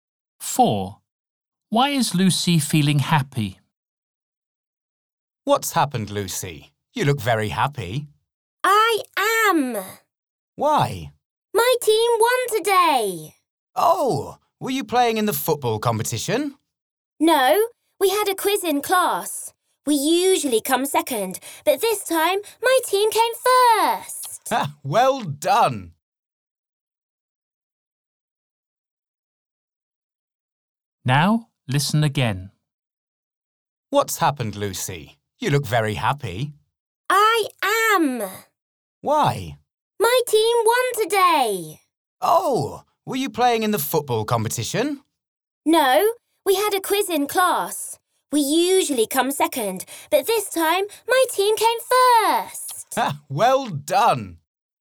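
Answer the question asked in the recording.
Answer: her team came first in a class quiz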